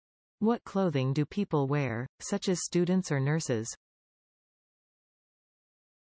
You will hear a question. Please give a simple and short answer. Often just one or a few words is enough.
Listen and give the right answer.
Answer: Uniform